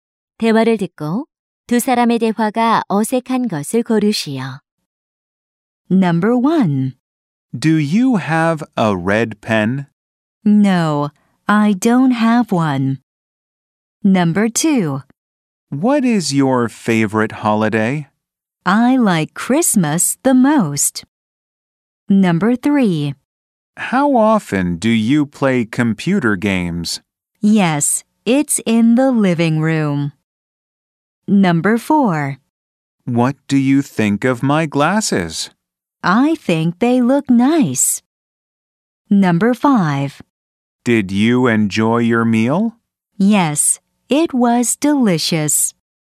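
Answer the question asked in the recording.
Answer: 3: How often do you play computer games? / Yes, it's in the living room.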